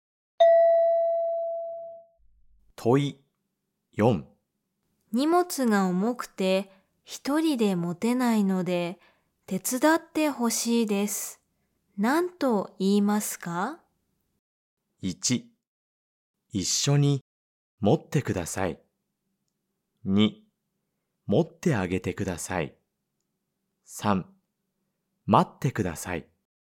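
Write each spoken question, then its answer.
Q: 荷物が重くて一人で持てないので手伝ってほしいです。何と言いますか?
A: 1: 一緒に持ってください。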